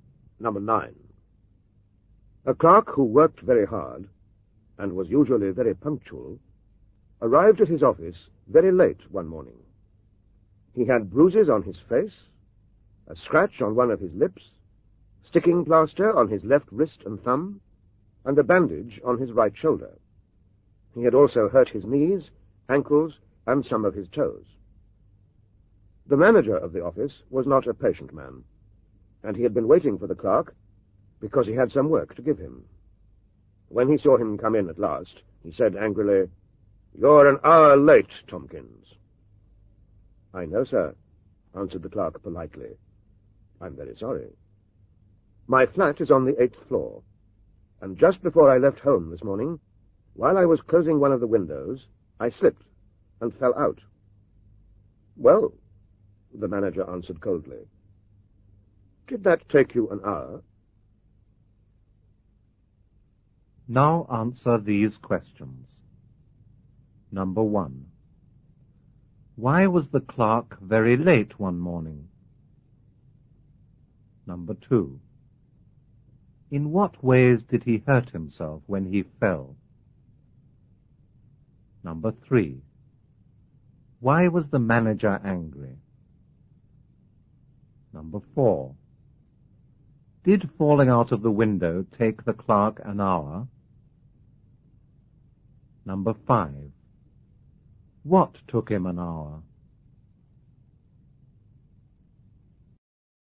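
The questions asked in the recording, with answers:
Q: Why was the clerk very late one morning?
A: He slipped and fell out of the window of his 8th-floor flat.

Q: In what ways did he hurt himself when he fell?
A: Bruises on his face, a scratched lip, hurt left wrist and thumb, right shoulder, knees, ankles and toes.

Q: Why was the manager angry?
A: The clerk was an hour late and he had work to give him.

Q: Did falling out of the window take the clerk an hour?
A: No.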